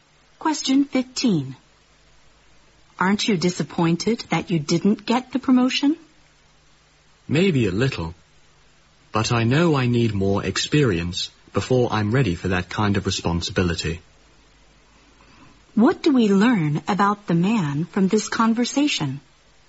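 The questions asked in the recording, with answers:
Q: What do we learn about the man from this conversation?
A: He didn't get the promotion but accepts that he needs more experience first.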